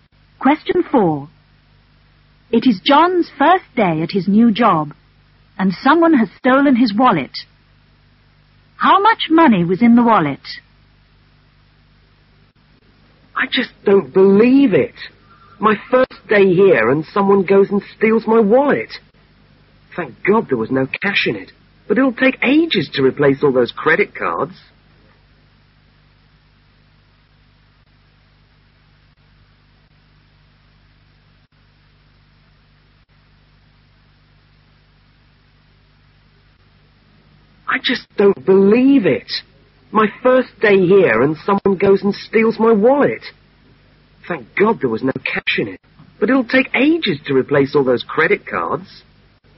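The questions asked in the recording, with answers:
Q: How much money was in the wallet?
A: None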